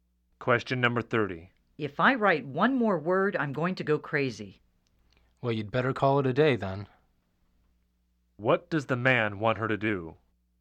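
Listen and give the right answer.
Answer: Stop working for the day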